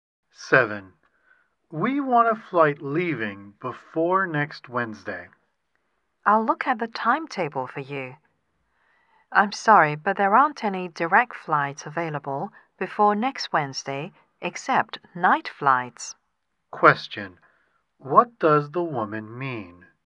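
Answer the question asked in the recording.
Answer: There are only night direct flights before next Wednesday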